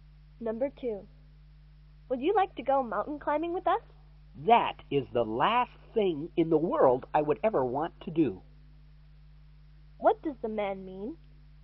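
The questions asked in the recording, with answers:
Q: What does the man mean?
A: He doesn't want to go mountain climbing at all.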